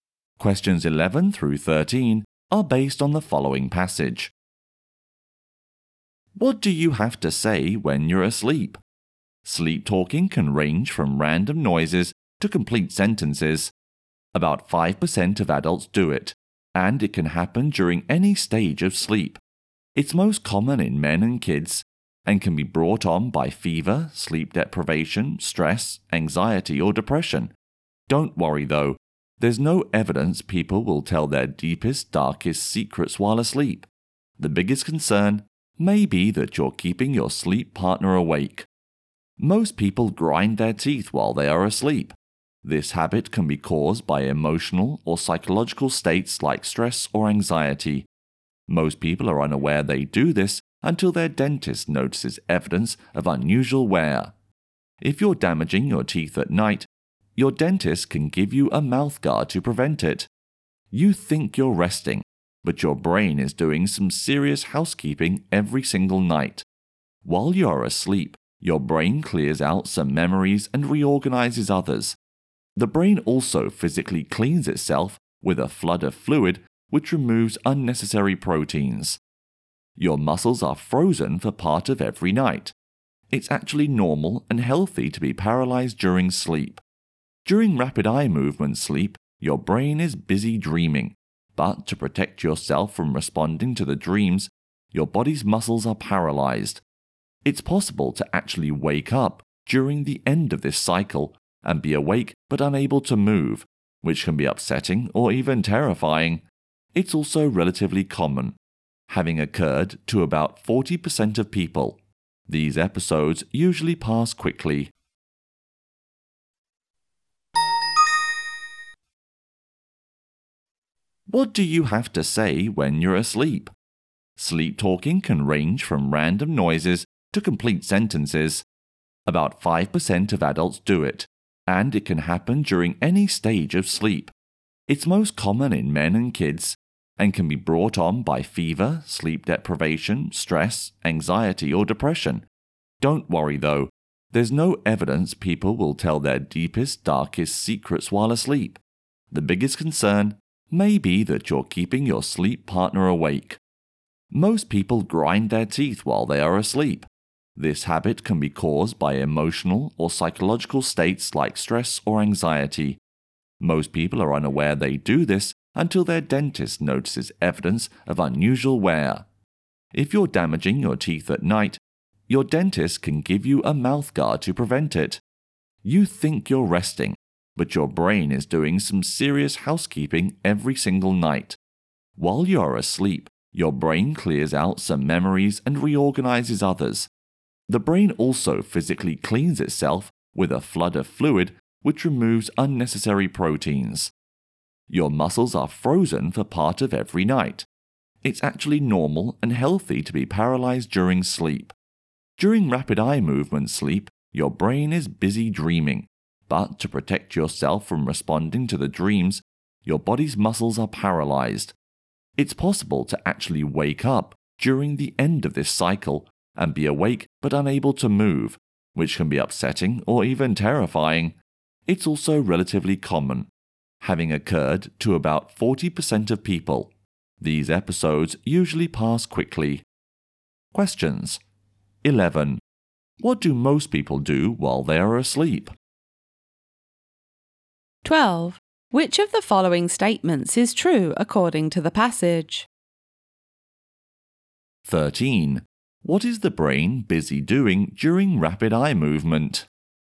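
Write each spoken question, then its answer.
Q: What do most people do while they are asleep?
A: They grind their teeth.

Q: What is the brain busy doing during rapid eye movement?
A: Dreaming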